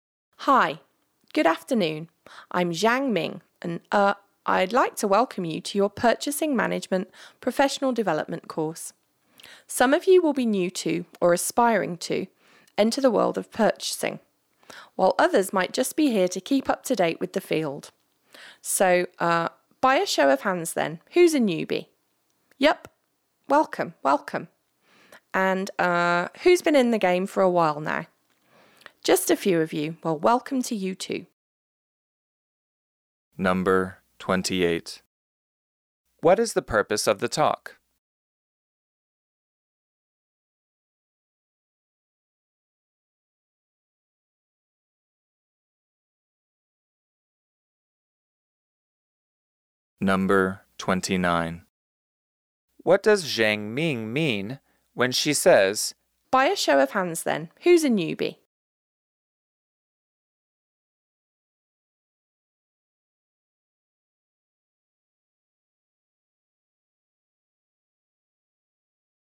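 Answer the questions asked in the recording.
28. To welcome participants to a Purchasing Management Professional Development course
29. She wants to know which participants are new to purchasing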